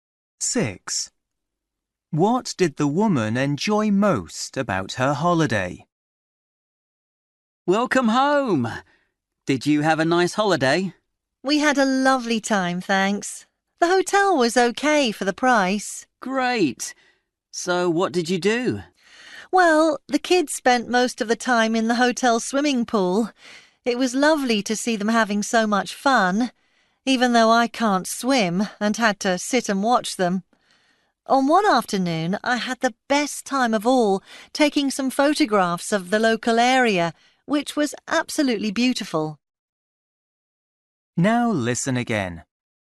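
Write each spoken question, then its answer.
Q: What did the woman enjoy most about her holiday?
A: Taking photographs of the local area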